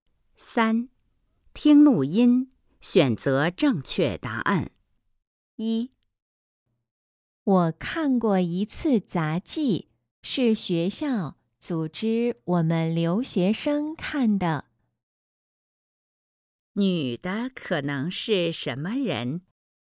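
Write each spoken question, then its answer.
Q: 女的可能是什么人?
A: 留学生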